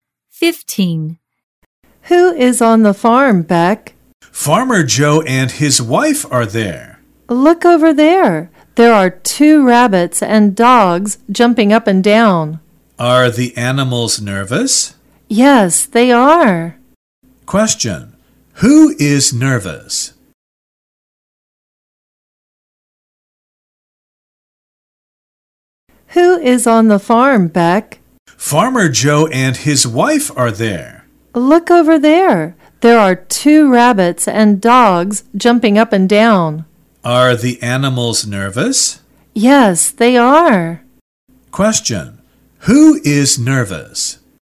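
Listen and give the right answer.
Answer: The animals (the two rabbits and the dogs)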